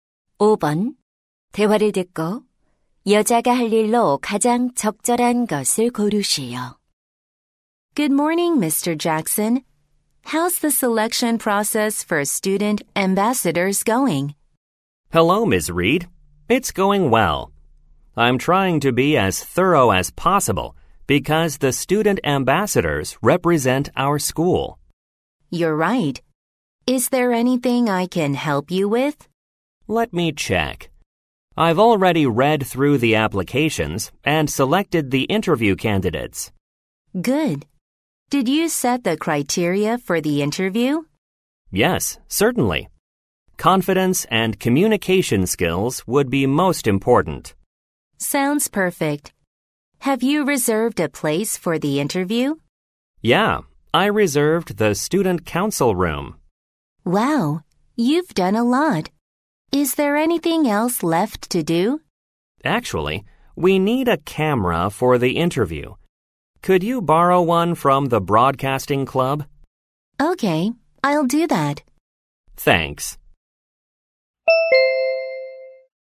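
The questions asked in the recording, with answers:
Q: 대화를 듣고 여자가 할 일로 가장 적절한 것을 고르시오.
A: 방송부에서 카메라 빌려오기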